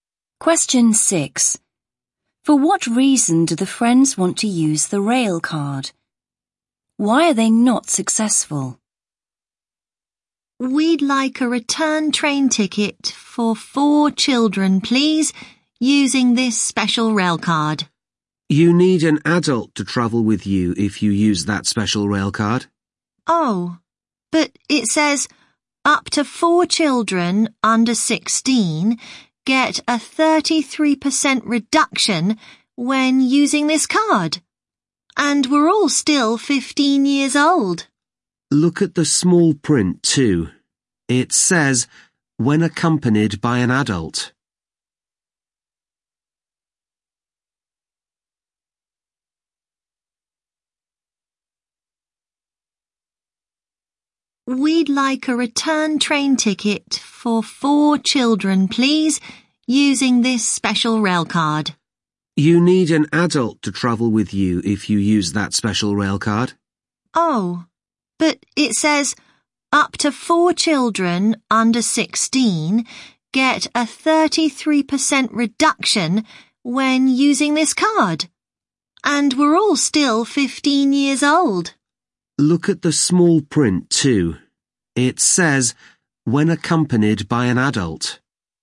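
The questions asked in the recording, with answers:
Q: For what reason do the friends want to use the rail card?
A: To get a 33% reduction on the ticket

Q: Why are they not successful?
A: They need an adult to travel with them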